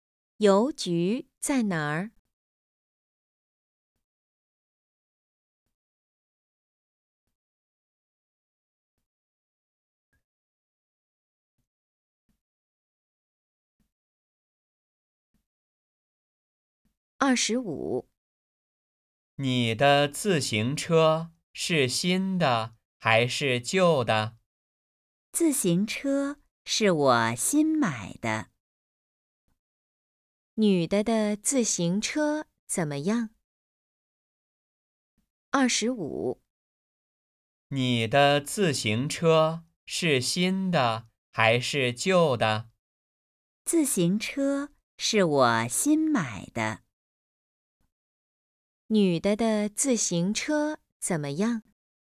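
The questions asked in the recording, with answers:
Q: 女的的自行车怎么样?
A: 是新买的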